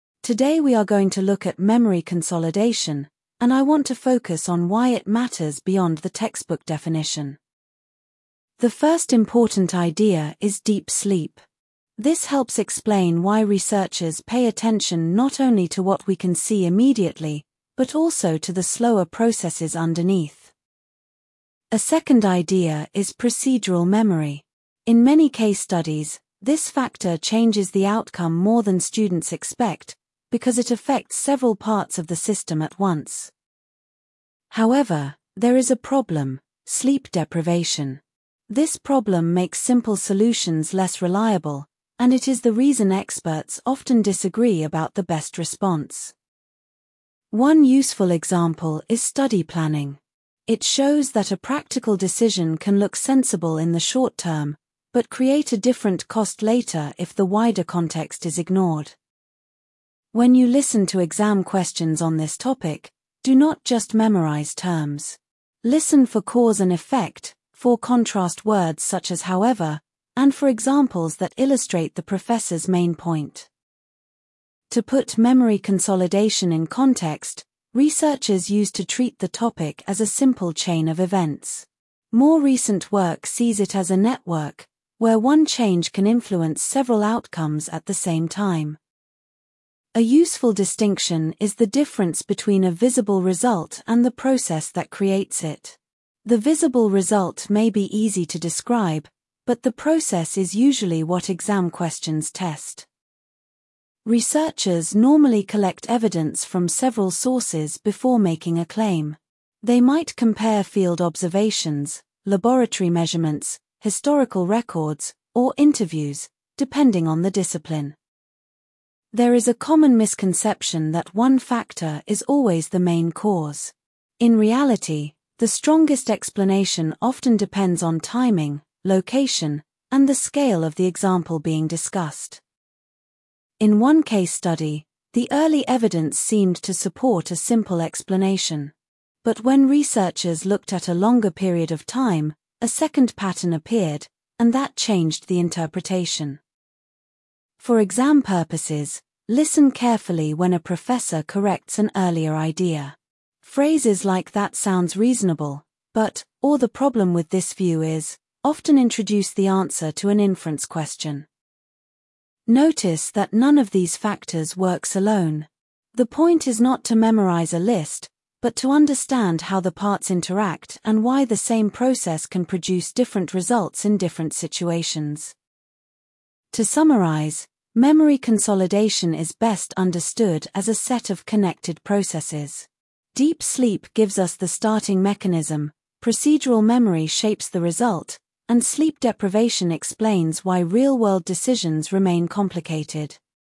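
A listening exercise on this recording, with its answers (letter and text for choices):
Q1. What is the lecture mainly about?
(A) Memory consolidation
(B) A student housing policy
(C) A library rule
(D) A language placement test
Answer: (A) Memory consolidation

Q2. What is the first important idea?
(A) Deep sleep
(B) Procedural memory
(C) Sleep deprivation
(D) Study planning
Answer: (A) Deep sleep

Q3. What is the second idea discussed?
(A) Study planning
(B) Campus funding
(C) Procedural memory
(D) Exam registration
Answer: (C) Procedural memory

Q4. Why is the issue complicated?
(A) It makes simple solutions less reliable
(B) It has no examples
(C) It is only historical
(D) It is unrelated to practice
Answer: (A) It makes simple solutions less reliable

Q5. What does the example show?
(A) Short-term decisions can have later costs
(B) Definitions are never useful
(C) Students should avoid examples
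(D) The topic is solved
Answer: (A) Short-term decisions can have later costs

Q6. What should listeners pay attention to in exam questions?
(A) Only names and dates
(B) Cause, effect, contrast words, and examples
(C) Spelling rules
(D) The professor's accent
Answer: (B) Cause, effect, contrast words, and examples

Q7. How does the professor summarise the topic?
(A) As one simple rule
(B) As connected processes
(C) As a personal opinion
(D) As an administrative problem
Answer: (B) As connected processes

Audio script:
Today we are going to look at memory consolidation, and I want to focus on why it matters beyond the textbook definition.
The first important idea is deep sleep. This helps explain why researchers pay attention not only to what we can see immediately, but also to the slower processes underneath.
A second idea is procedural memory. In many case studies, this factor changes the outcome more than students expect, because it affects several parts of the system at once.
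However, there is a problem: sleep deprivation. This problem makes simple solutions less reliable, and it is the reason experts often disagree about the best response.
One useful example is study planning. It shows that a practical decision can look sensible in the short term, but create a different cost later if the wider context is ignored.
When you listen to exam questions on this topic, do not just memorise terms. Listen for cause and effect, for contrast words such as however, and for examples that illustrate the professor's main point.
To put memory consolidation in context, researchers used to treat the topic as a simple chain of events. More recent work sees it as a network, where one change can influence several outcomes at the same time.
A useful distinction is the difference between a visible result and the process that creates it. The visible result may be easy to describe, but the process is usually what exam questions test.
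Researchers normally collect evidence from several sources before making a claim. They might compare field observations, laboratory measurements, historical records, or interviews, depending on the discipline.
There is a common misconception that one factor is always the main cause. In reality, the strongest explanation often depends on timing, location, and the scale of the example being discussed.
In one case study, the early evidence seemed to support a simple explanation. But when researchers looked at a longer period of time, a second pattern appeared, and that changed the interpretation.
For exam purposes, listen carefully when a professor corrects an earlier idea. Phrases like that sounds reasonable, but, or the problem with this view is, often introduce the answer to an inference question.
Notice that none of these factors works alone. The point is not to memorise a list, but to understand how the parts interact and why the same process can produce different results in different situations.
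To summarise, memory consolidation is best understood as a set of connected processes. Deep sleep gives us the starting mechanism, procedural memory shapes the result, and sleep deprivation explains why real-world decisions remain complicated.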